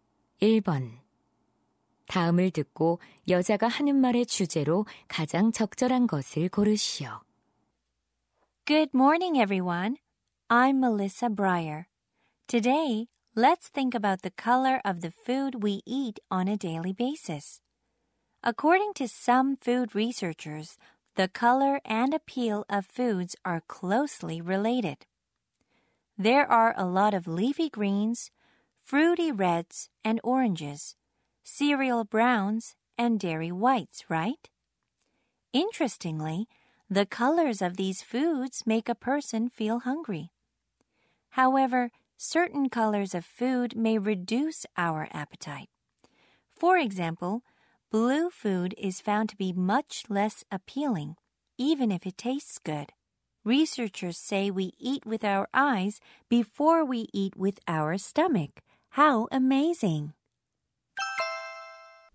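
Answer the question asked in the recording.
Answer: 음식의 색깔이 식욕에 미치는 영향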